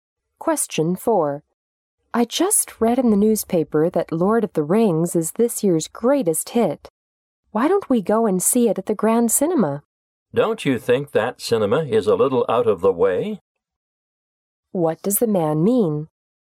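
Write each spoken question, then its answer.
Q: What does the man mean?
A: The cinema is too far away.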